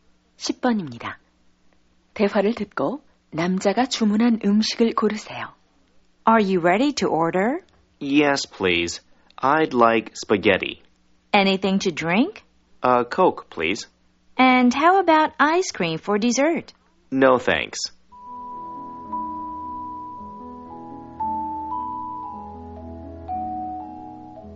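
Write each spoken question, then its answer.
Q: 대화를 듣고 남자가 주문한 음식을 고르세요.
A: 스파게티와 콜라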